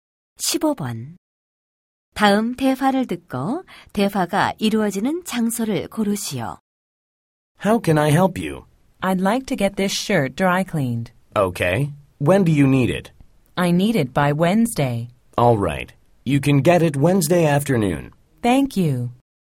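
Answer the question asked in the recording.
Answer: 세탁소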